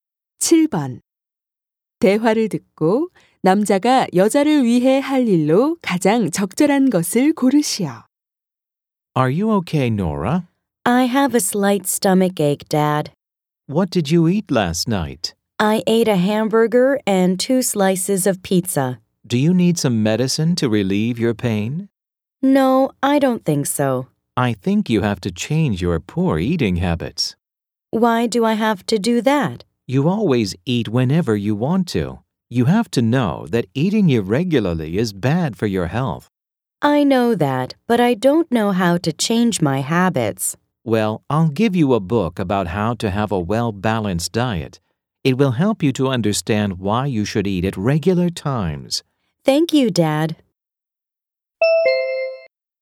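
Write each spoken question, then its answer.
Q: 대화를 듣고 남자가 여자를 위해 할 일로 가장 적절한 것을 고르시오.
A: 균형 잡힌 식단에 관한 책 주기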